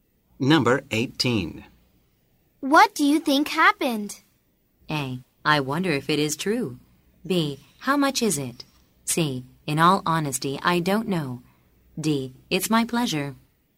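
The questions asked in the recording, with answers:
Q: What do you think happened?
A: C: In all honesty, I don't know.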